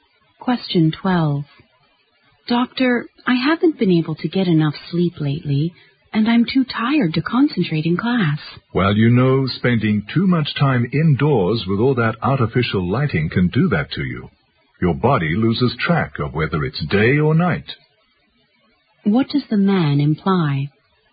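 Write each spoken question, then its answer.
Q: What does the man imply?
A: Too much time indoors under artificial lighting is upsetting her sleep.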